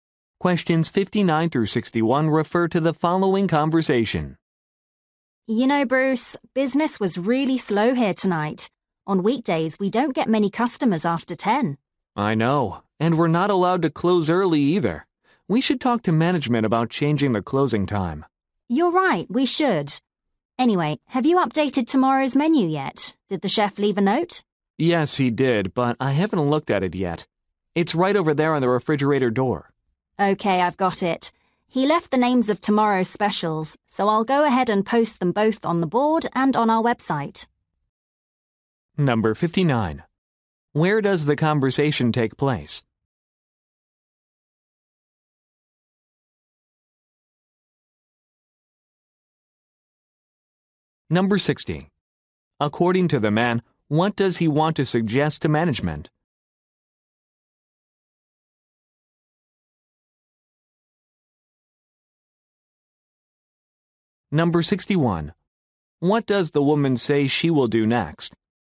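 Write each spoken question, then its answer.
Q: Where does the conversation take place?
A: At a restaurant

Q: According to the man, what does he want to suggest to management?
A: Changing the closing time

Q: What does the woman say she will do next?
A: Post the specials on the board and the website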